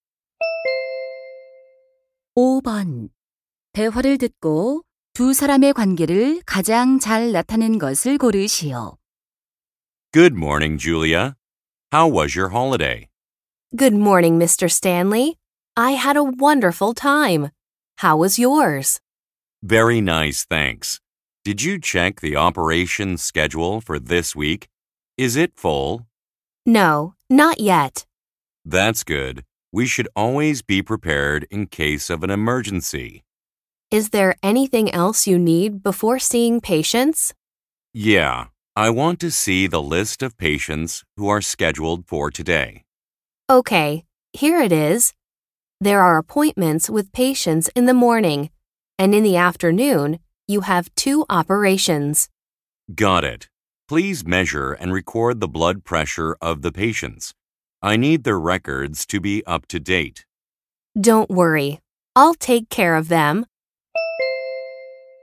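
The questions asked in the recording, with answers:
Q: 대화를 듣고 두 사람의 관계를 가장 잘 나타낸 것을 고르시오.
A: 의사 - 간호사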